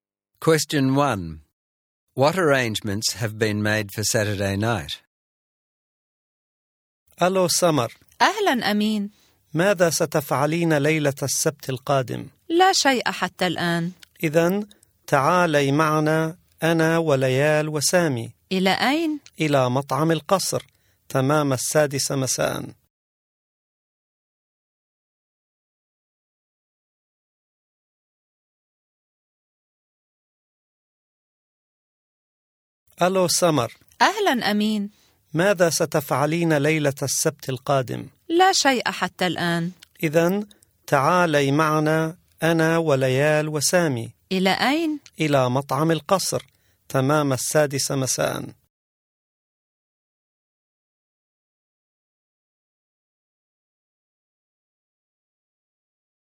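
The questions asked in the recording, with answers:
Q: What arrangements have been made for Saturday night?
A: Samar will go with Amin, Layal and Sami to the Al-Qasr restaurant at 6 pm.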